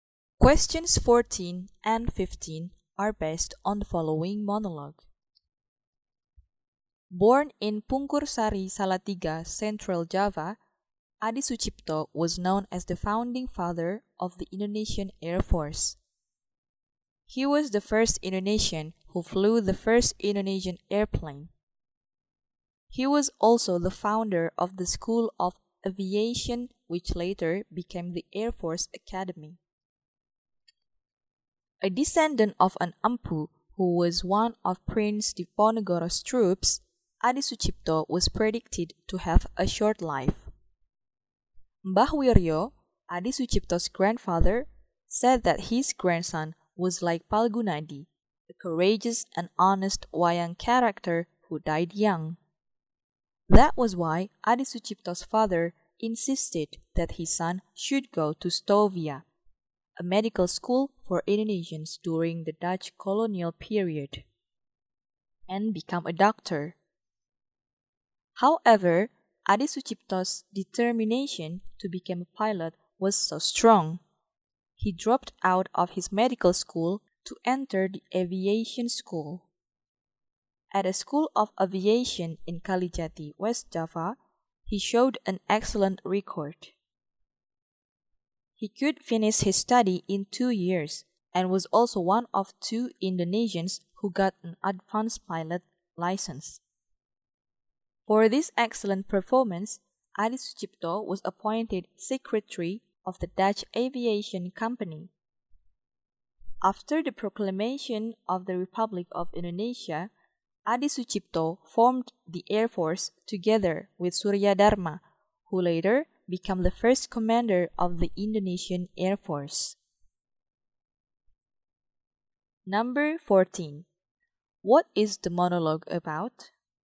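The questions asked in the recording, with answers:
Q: What is the monologue about?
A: Adi Sucipto, the founding father of the Indonesian Air Force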